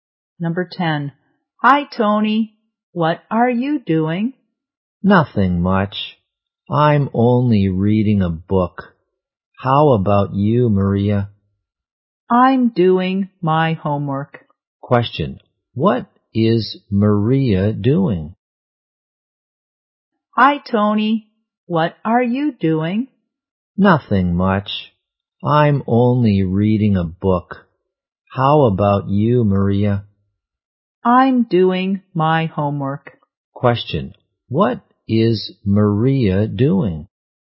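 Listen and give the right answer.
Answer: Doing her homework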